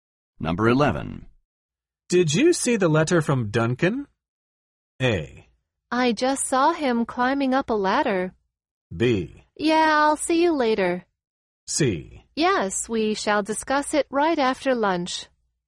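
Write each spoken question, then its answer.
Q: Did you see the letter from Duncan?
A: C: Yes, we shall discuss it right after lunch.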